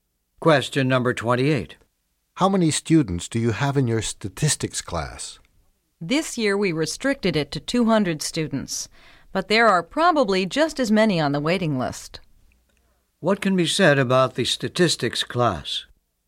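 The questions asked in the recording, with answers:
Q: What can be said about the statistics class?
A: It is very popular; enrollment is limited to 200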